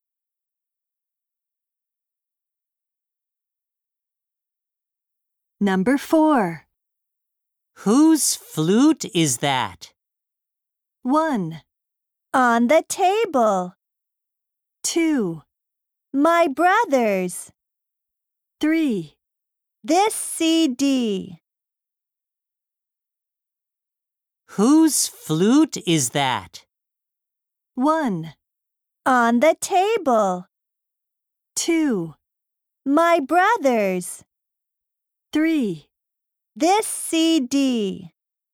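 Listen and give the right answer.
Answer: 2: My brother's.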